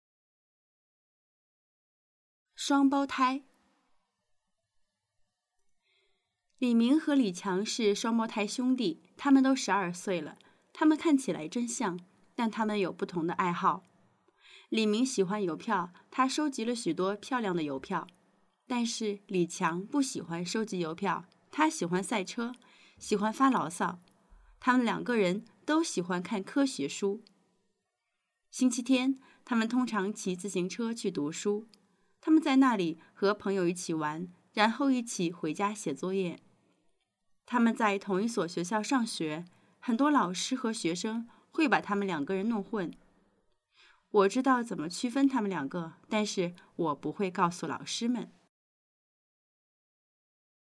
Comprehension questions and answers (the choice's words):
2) 李明和李强的共同点不包括以下哪个?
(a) 他们是共同年龄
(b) 他们喜欢读书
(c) 他们喜欢集邮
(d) 他们都姓李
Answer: 他们喜欢集邮

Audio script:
李明和李强是双胞胎兄弟,他们都十二岁了。他们看起来真像。但他们有不同的爱好。
他们看起来真像。但他们有不同的爱好。 李明喜欢邮票。他收集了许多漂亮的邮票。但是李强不喜欢收集邮票,他喜欢赛车,喜欢发牢骚。他们两个人都喜欢看科学书。 星期天,他们通常骑自行车去读书。他们在那里和朋友一起玩。然后一起回家写作业。他们在同一所学校上学,很多老师和学生会把他们两个人弄混。我知道怎么区分他们两个,但是我不会告诉老师们!